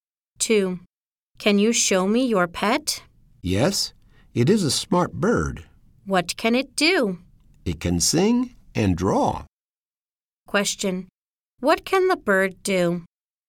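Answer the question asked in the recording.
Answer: It can sing and draw.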